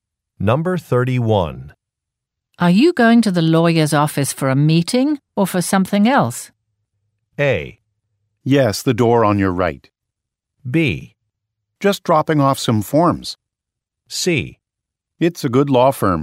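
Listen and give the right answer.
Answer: B: Just dropping off some forms.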